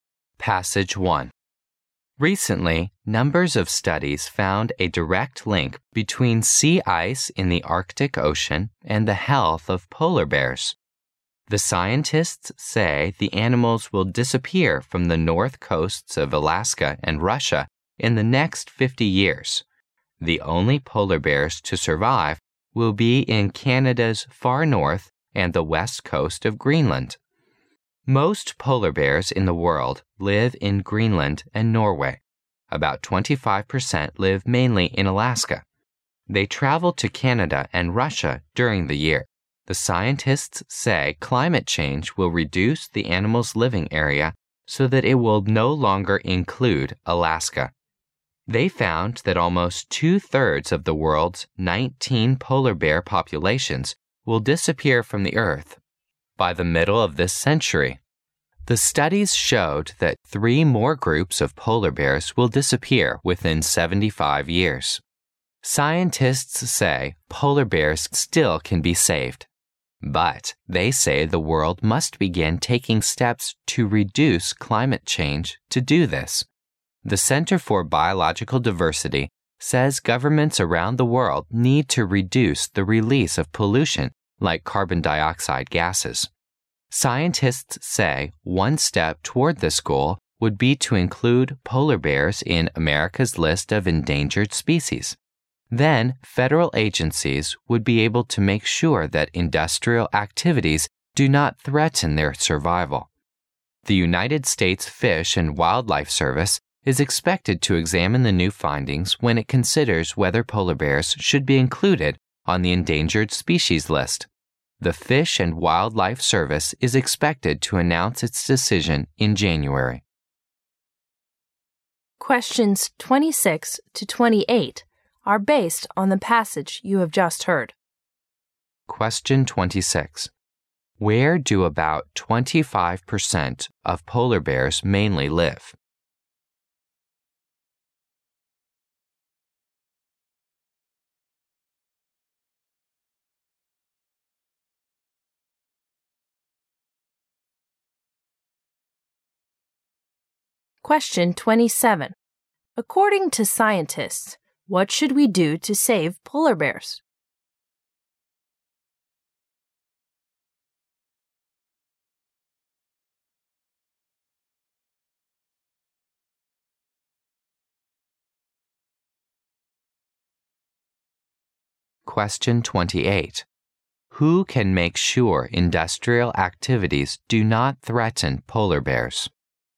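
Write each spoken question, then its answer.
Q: Where do about 25% of polar bears mainly live?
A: Alaska

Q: According to scientists, what should we do to save polar bears?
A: Take steps to reduce climate change

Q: Who can make sure industrial activities do not threaten polar bears?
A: Federal agencies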